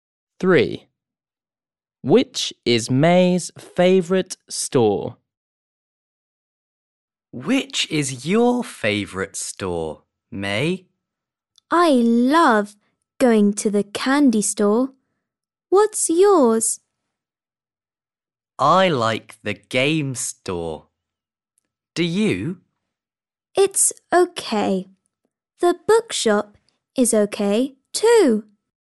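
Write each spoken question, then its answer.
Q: Which is May's favourite store?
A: the candy store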